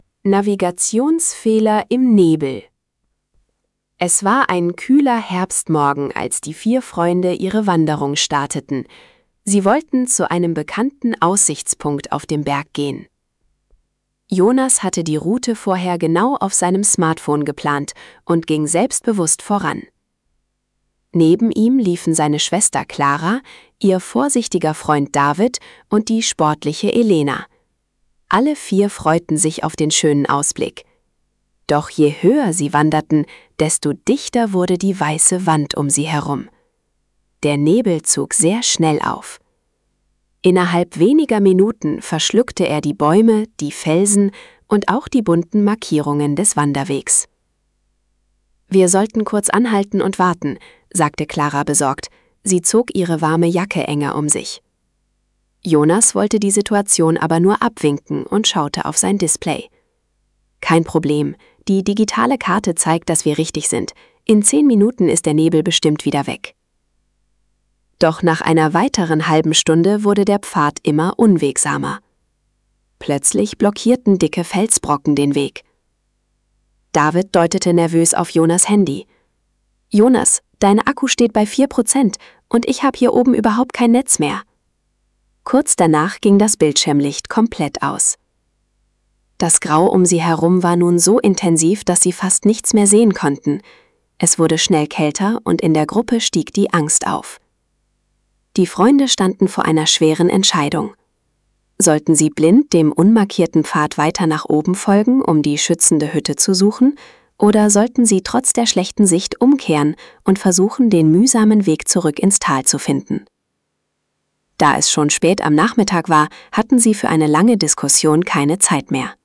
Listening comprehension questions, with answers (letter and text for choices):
Wählen Sie bei den folgenden Aufgaben die einzig richtige Option aus. (Die richtigen Antworten sind gleichmäßig über A, B, C und D verteilt!)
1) Was war das ursprüngliche Ziel der vier Wanderer?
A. Sie wollten ein Notlager im Wald errichten.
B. Sie suchten nach einem Bach im Tal.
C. Sie wollten den Aussichtspunkt auf dem Berg erreichen.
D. Sie planten die Besichtigung eines Dorfgasthofs.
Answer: C. Sie wollten den Aussichtspunkt auf dem Berg erreichen.

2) Welches Problem überraschte die Gruppe beim Aufstieg?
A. Ein heftiges Gewitter mit starkem Wind.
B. Ein dichter Nebel, der sehr schnell aufzog.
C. Ein plötzlicher Wintereinbruch mit viel Schnee.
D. Ein langanhaltender, heißer Sommerregen.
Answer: B. Ein dichter Nebel, der sehr schnell aufzog.

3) Warum konnte Jonas seine digitale Karte am Ende nicht mehr nutzen?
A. Weil er die Wander-App aus Versehen gelöscht hatte.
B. Weil der Bildschirm durch den Nebel zu nass war.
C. Weil sein Smartphone ins Wasser gefallen war.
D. Weil sein Akku leer war und das Gerät ausging.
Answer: D. Weil sein Akku leer war und das Gerät ausging.

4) Welches zusätzliche Problem stellt David vor dem Ausfall des Handys fest?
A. Es gibt hier oben überhaupt kein Mobilfunknetz mehr.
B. Die Gruppe hat keine warmen Jacken dabei.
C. Er hat seinen Rucksack am Parkplatz vergessen.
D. Der schmale Pfad ist komplett gesperrt.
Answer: A. Es gibt hier oben überhaupt kein Mobilfunknetz mehr.

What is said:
Navigationsfehler im Nebel
Es war ein kühler Herbstmorgen, als die vier Freunde ihre Wanderung starteten. Sie wollten zu einem bekannten Aussichtspunkt auf dem Berg gehen. Jonas hatte die Route vorher genau auf seinem Smartphone geplant und ging selbstbewusst voran. Neben ihm liefen seine Schwester Clara, ihr vorsichtiger Freund David und die sportliche Elena. Alle vier freuten sich auf den schönen Ausblick. Doch je höher sie wanderten, desto dichter wurde die weiße Wand um sie herum. Der Nebel zog sehr schnell auf. Innerhalb weniger Minuten verschluckte er die Bäume, die Felsen und auch die bunten Markierungen des Wanderwegs.
„Wir sollten kurz anhalten und warten", sagte Clara besorgt. Sie zog ihre warme Jacke enger um sich. Jonas wollte die Situation aber nur abwinken und schaute auf sein Display. „Kein Problem, die digitale Karte zeigt, dass wir richtig sind. In zehn Minuten ist der Nebel bestimmt wieder weg."
Doch nach einer weiteren halben Stunde wurde der Pfad immer unwegsamer. Plötzlich blockierten dicke Felsbrocken den Weg. David deutete nervös auf Jonas' Handy: „Jonas, dein Akku steht bei vier Prozent. Und ich habe hier oben überhaupt kein Netz mehr." Kurz danach ging das Bildschirm-Licht komplett aus. Das Grau um sie herum war nun so intensiv, dass sie fast nichts mehr sehen konnten. Es wurde schnell kälter und in der Gruppe stieg die Angst auf.
Die Freunde standen vor einer schweren Entscheidung: Sollten sie blind dem unmarkierten Pfad weiter nach oben folgen, um die schützende Hütte zu suchen? Oder sollten sie trotz der schlechten Sicht umkehren und versuchen, den mühsamen Weg zurück ins Tal zu finden? Da es schon spät am Nachmittag war, hatten sie für eine lange Diskussion keine Zeit mehr.

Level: B1